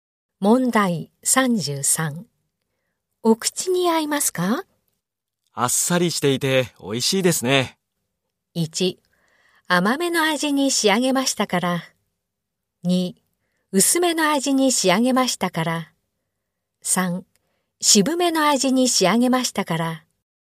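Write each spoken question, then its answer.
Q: お口に合いますか?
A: 2: 薄めの味に仕上げましたから。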